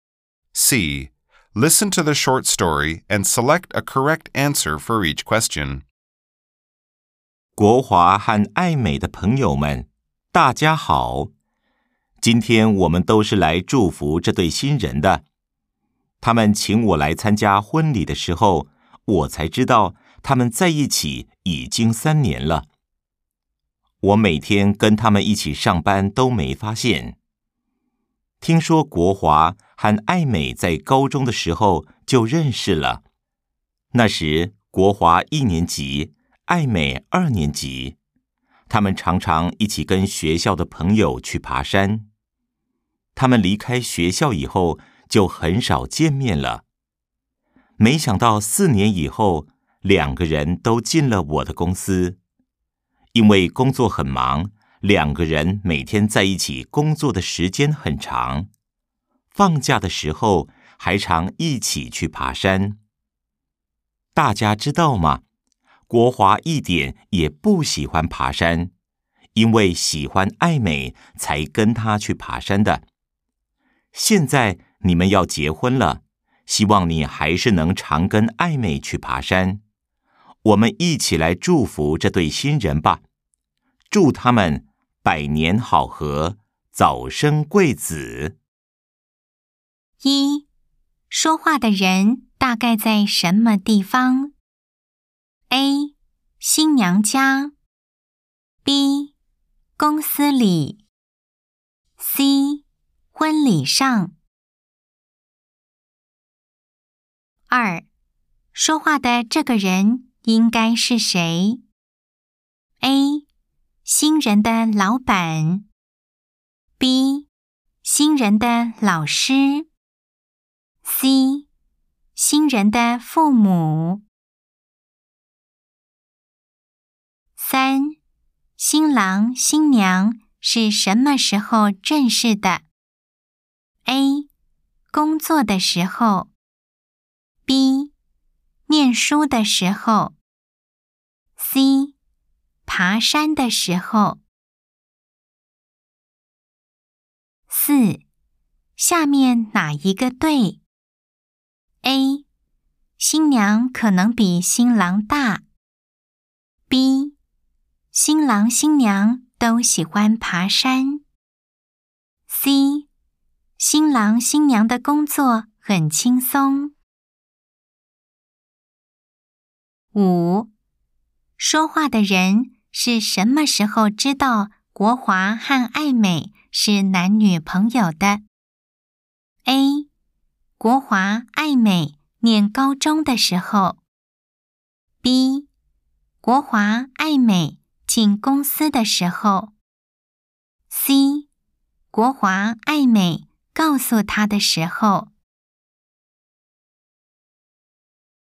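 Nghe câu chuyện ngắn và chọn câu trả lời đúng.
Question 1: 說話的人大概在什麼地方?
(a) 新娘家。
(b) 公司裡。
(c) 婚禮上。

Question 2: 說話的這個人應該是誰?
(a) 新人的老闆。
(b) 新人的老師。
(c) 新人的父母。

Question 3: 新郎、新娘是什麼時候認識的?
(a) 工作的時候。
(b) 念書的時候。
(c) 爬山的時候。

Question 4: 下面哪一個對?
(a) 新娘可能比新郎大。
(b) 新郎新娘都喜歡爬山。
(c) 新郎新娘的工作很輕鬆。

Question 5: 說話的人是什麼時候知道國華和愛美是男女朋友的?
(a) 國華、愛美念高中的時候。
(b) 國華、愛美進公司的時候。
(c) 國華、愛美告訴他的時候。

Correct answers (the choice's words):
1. 婚禮上。
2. 新人的老闆。
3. 念書的時候。
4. 新娘可能比新郎大。
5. 國華、愛美告訴他的時候。

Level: Đương Đại 2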